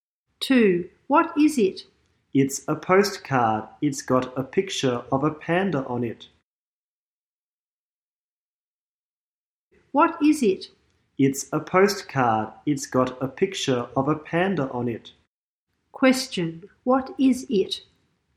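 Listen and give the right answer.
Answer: A postcard with a picture of a panda on it.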